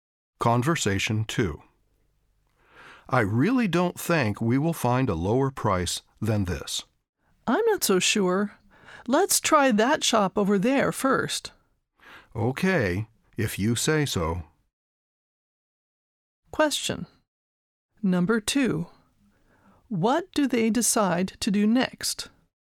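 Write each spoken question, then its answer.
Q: What do they decide to do next?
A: Try another shop over there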